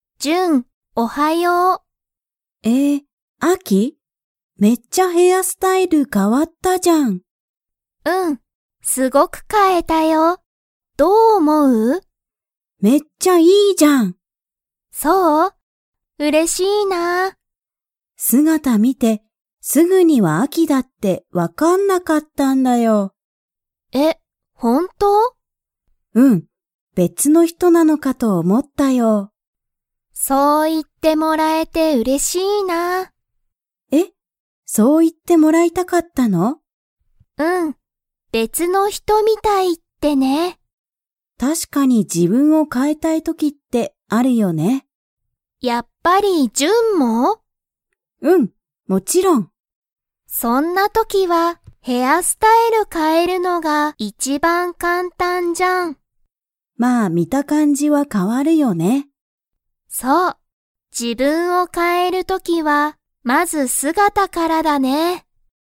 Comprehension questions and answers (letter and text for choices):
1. ジュンは、アキの姿(すがた)を見(み)て、すぐにアキだと分(わ)かりましたか?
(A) はい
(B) いいえ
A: (B) いいえ

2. アキは、別(べつ)の____みたいって言(い)ってもらいたかった。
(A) 姿(すがた)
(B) 人(ひと)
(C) 簡単(かんたん)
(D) 写真(しゃしん)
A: (B) 人(ひと)